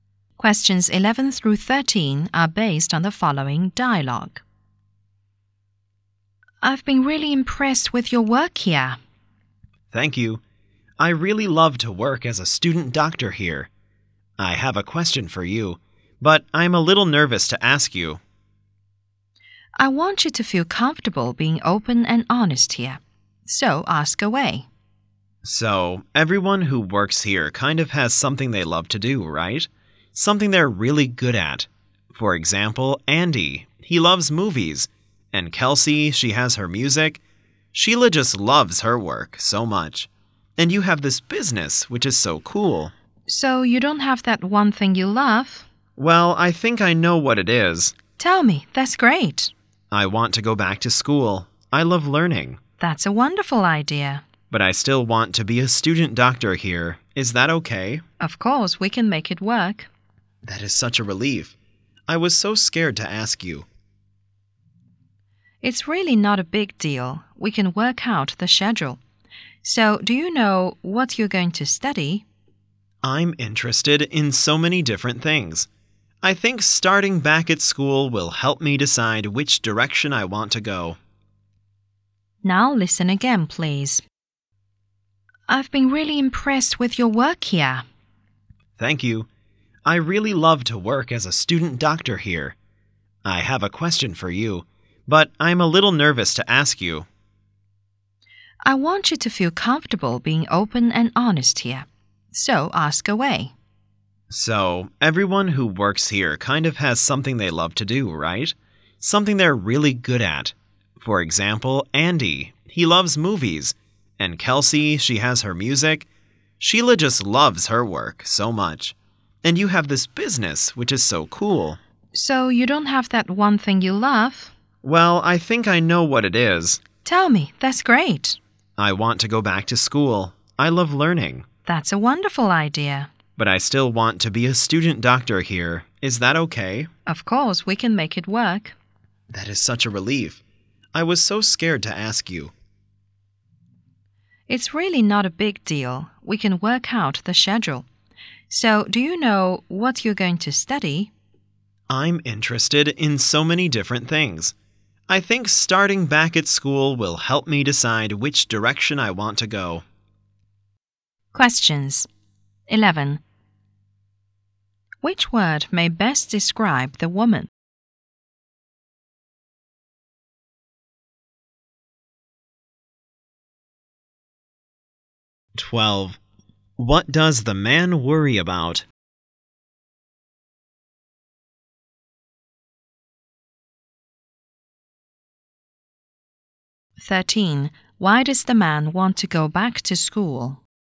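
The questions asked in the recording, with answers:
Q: Why does the man want to go back to school?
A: He loves learning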